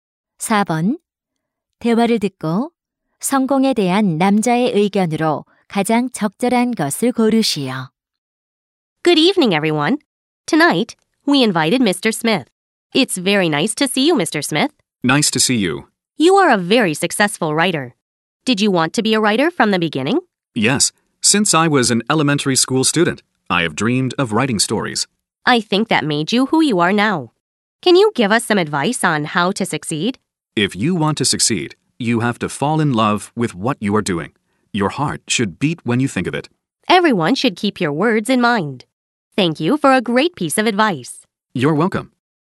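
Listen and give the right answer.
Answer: 성공하려면 하는 일을 사랑해야 한다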